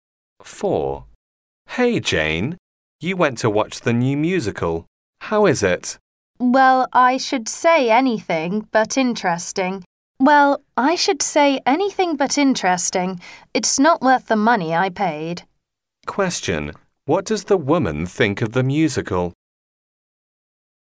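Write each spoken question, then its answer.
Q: What does the woman think of the musical?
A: It was boring and not worth the money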